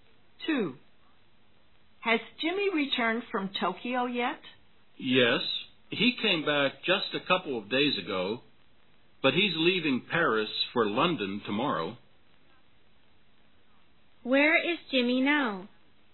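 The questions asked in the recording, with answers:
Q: Where is Jimmy now?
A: In Paris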